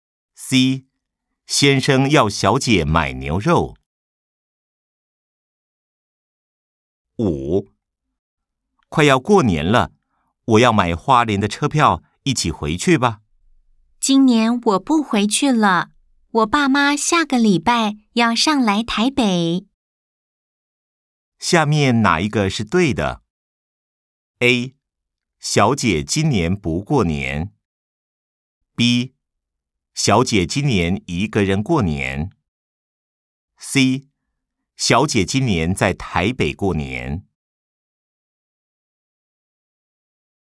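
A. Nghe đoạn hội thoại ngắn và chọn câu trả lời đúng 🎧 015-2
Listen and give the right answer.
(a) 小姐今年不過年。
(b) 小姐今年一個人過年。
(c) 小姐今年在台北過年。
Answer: (c) 小姐今年在台北過年。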